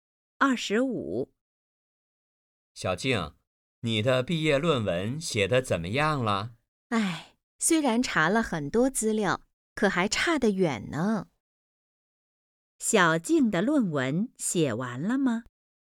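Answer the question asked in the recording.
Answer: 没写完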